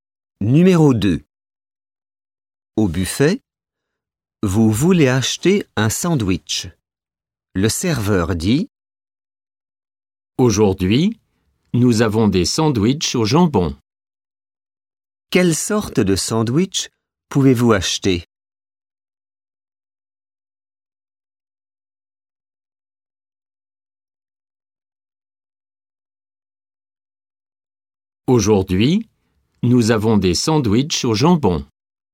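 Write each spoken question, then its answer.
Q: Quelle sorte de sandwich pouvez-vous acheter?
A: un sandwich au jambon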